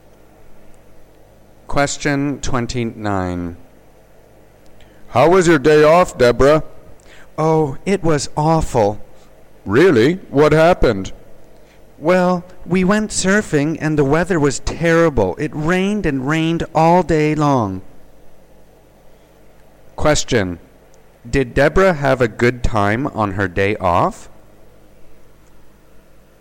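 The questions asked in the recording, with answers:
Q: Did Deborah have a good time on her day off?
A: No, it was awful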